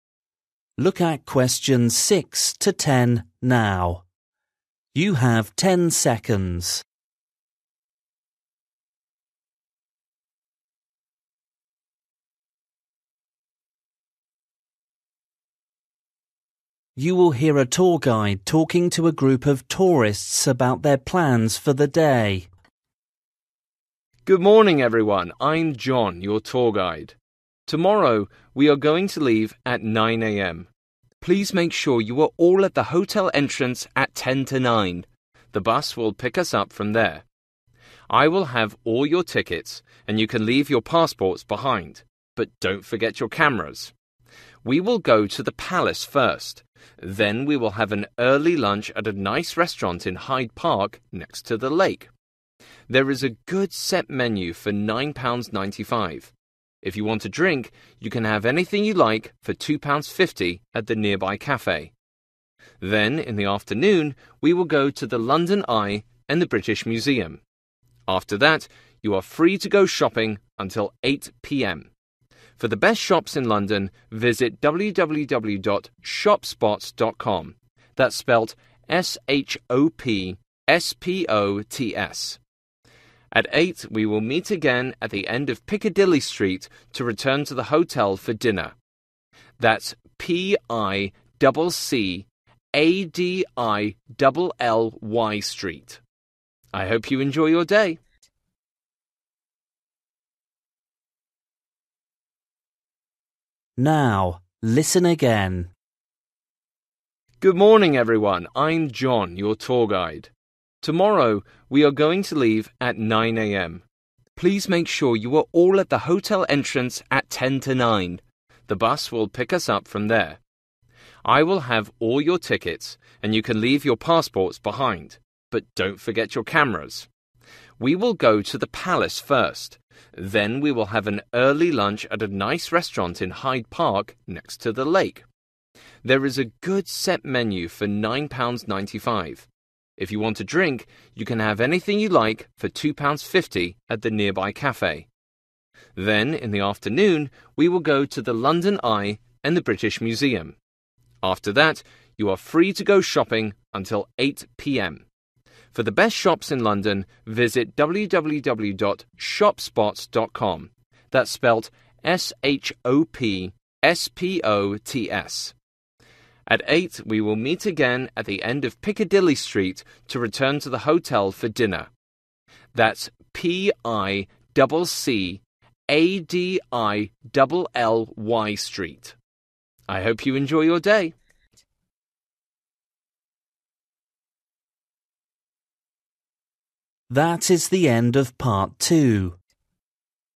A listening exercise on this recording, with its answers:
For each question, write the correct answer in the gap. Write one word or a number or a date or a time.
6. Meet at entrance: (6) ........................ a.m.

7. Bring: (7) ........................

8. Cost of lunch: (8) £ ........................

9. More information on: www. (9) ........................ .com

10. Meet at the end of: (10) ........................ Street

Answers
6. 8.50
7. cameras
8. 9.95
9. shopspots
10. Piccadilly

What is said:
M: Good morning, everyone. I'm John, your tour guide. Tomorrow we are going to leave at 9.00 am. (6) Please make sure you are all at the hotel entrance at 10 to 9. The bus will pick us up from I will have all your tickets and you can leave your passports behind. (7) But don't forget your cameras.
We will go to the Palace first. Then, we will have an early lunch at a nice restaurant in Hyde Park, next to the lake. (8) There is a good set menu for £9.95. If you want a drink, you can have anything you like for £2.50 at the nearby cafe. Then, in the afternoon, we will go to the London Eye and the British Museum. After that, you are free to go shopping until 8.00 pm. (9) For the best shops in London visit www.shopspots.com. That's spelt S-H-O-P-S-P-O-T-S.
(10) At 8.00 we will meet again at the end of Piccadilly Street to return to the hotel for dinner. That's P-I-DOUBLE C-A-D-I-DOUBLE L-Y Street. I hope you enjoy your day...

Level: KET (A2)